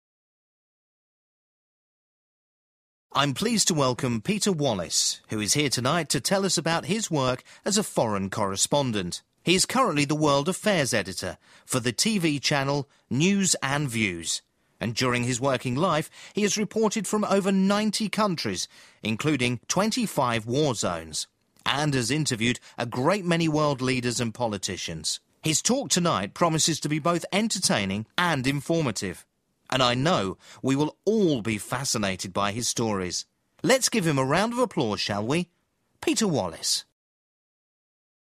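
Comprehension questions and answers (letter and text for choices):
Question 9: In what sector does Peter Wallis work?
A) education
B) charity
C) journalism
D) politics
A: C) journalism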